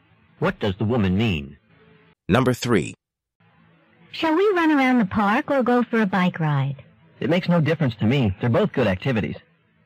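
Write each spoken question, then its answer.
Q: What does the man say about the activities?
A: He likes both equally and doesn't mind which they do.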